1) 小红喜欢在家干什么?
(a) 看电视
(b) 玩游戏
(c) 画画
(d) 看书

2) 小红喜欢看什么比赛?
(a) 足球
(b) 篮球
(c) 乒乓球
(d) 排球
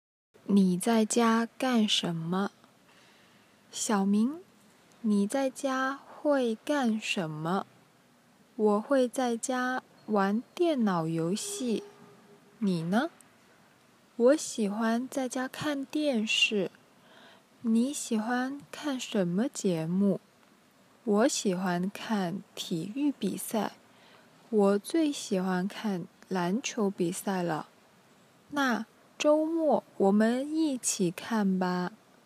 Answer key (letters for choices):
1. a
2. b

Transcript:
你在家干什么? 小红:小明,你在家会干什么? 小明:我会在家玩电脑游戏,你呢? 小红:我喜欢在家看电视。 小明:你喜欢看什么节目? 小红:我喜欢看体育比赛。我最喜欢看篮球比赛了!